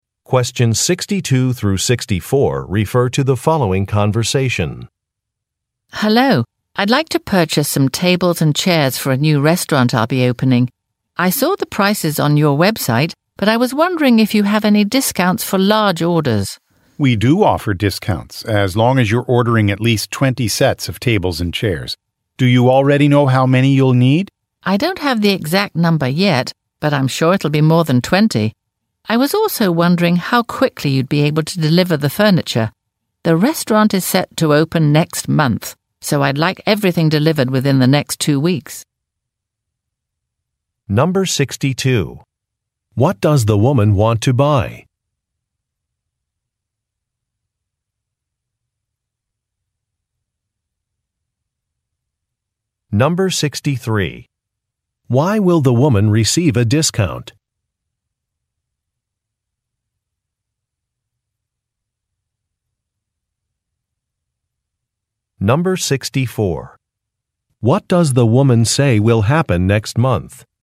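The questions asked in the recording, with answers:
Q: What does the woman want to buy?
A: Tables and chairs for a restaurant

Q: Why will the woman receive a discount?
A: She will order at least 20 sets of tables and chairs

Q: What does the woman say will happen next month?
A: Her restaurant will open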